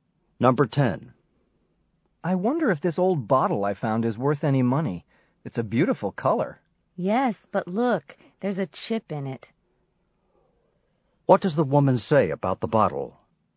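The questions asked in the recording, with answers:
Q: What does the woman say about the bottle?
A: It has a chip in it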